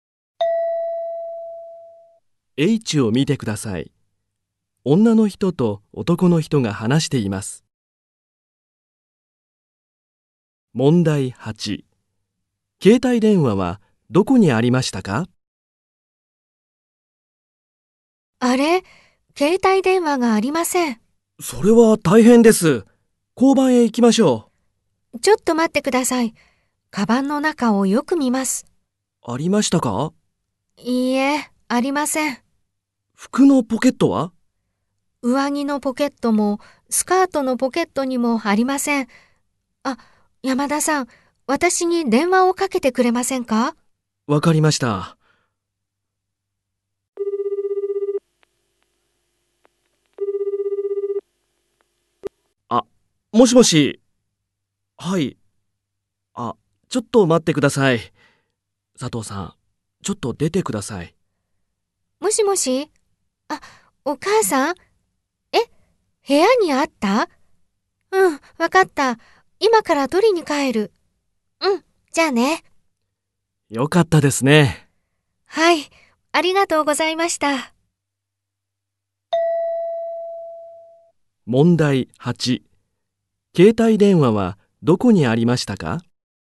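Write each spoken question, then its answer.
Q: 携帯電話はどこにありましたか?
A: 部屋(家)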